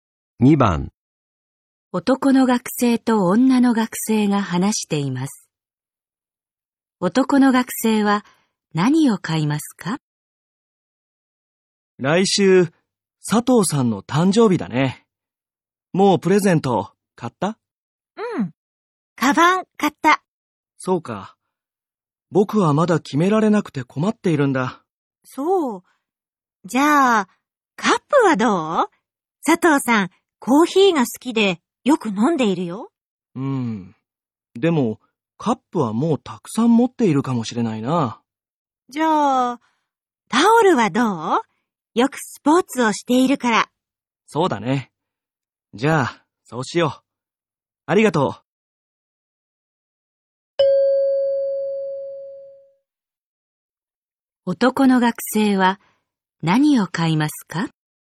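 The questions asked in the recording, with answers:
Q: 男の学生は何を買いますか?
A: タオル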